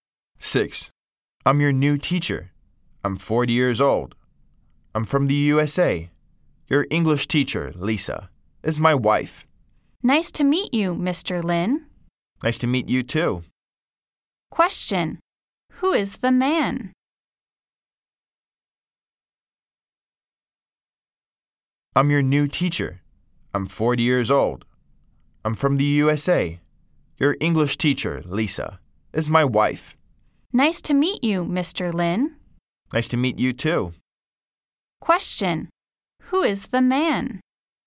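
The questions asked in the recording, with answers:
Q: Question, who is the man?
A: Mr. Lin, the new teacher from the USA (Lisa's husband)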